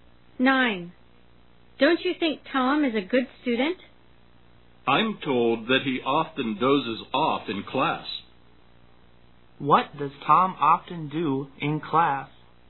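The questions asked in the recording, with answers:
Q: What does Tom often do in class?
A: He dozes off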